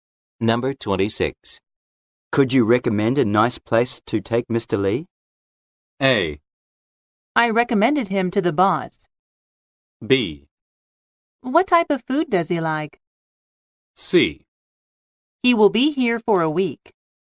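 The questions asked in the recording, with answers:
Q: Could you recommend a nice place to take Mr.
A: B: What type of food does he like?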